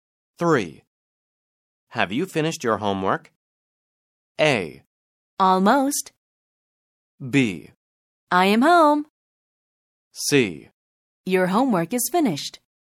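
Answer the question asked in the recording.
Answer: A: Almost.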